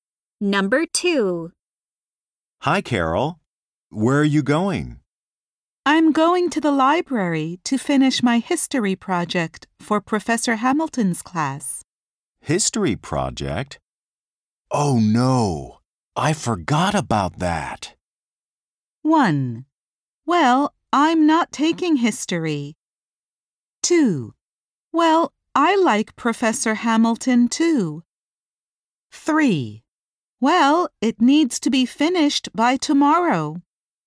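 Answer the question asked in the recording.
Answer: 3: Well, it needs to be finished by tomorrow.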